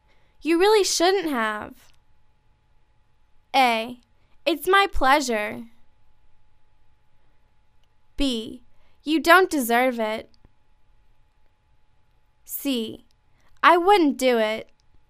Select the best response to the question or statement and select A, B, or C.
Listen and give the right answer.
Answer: It's my pleasure.